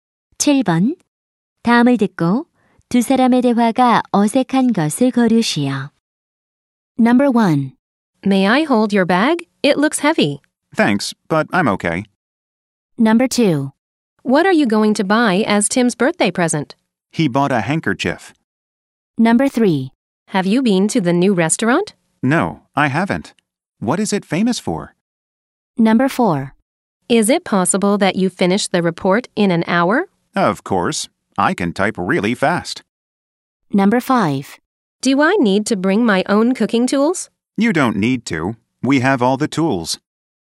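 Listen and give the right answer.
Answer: 2번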